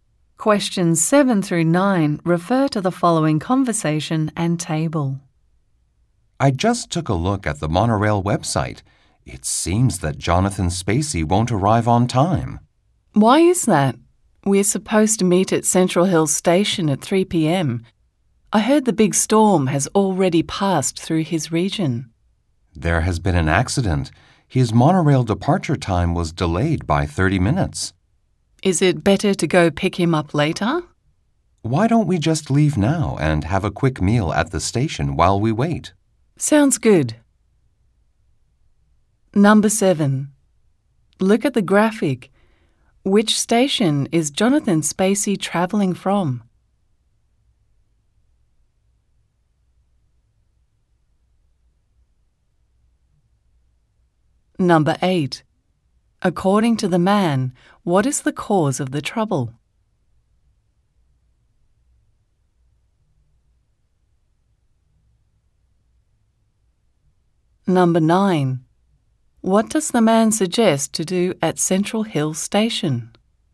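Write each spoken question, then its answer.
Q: According to the man, what is the cause of the trouble?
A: An accident

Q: What does the man suggest to do at Central Hill Station?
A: Have a quick meal while they wait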